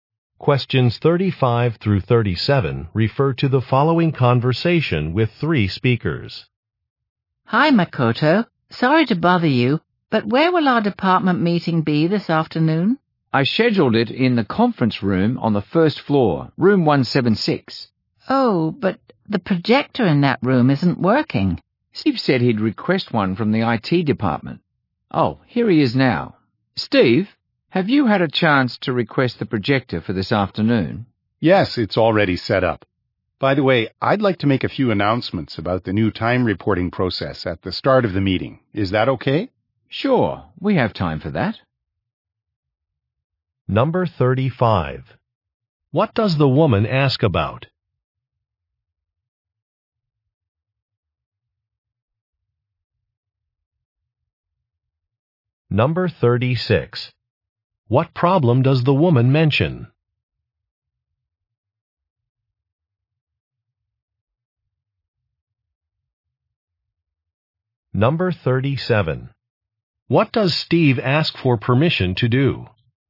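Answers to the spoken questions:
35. Where the department meeting will be
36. The projector in the conference room isn't working
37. Make announcements about the new time reporting process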